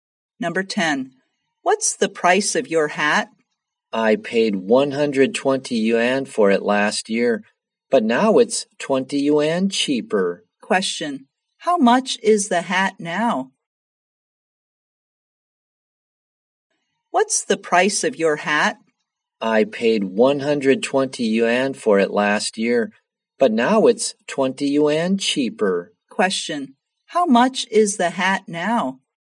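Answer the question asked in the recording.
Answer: 100 yuan.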